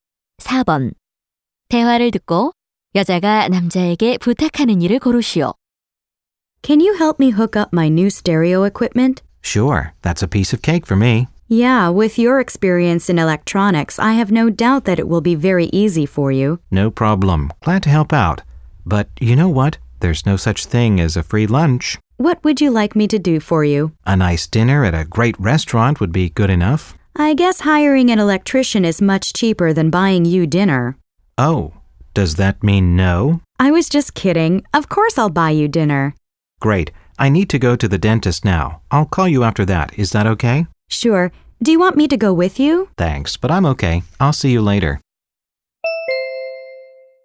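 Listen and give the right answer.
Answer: 새 스테레오 장비 설치(연결) 도와주기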